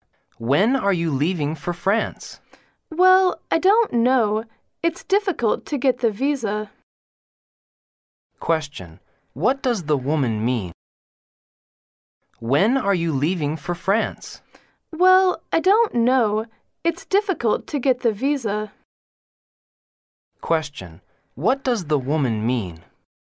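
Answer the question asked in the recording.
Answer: She isn't sure when she'll leave because getting a visa is difficult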